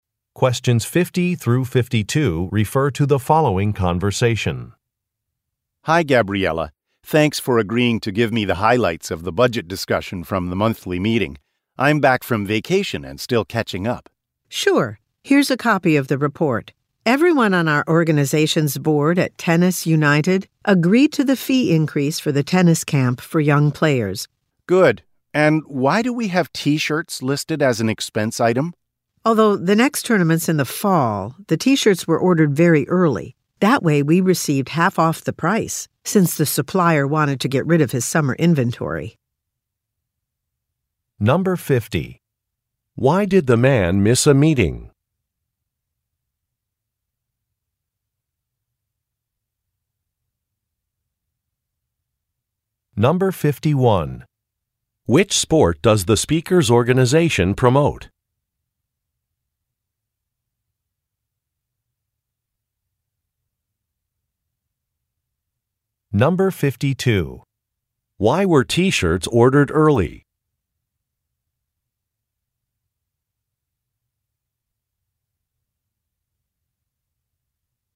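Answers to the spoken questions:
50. He was on vacation.
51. Tennis
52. To get a discount (half off the price).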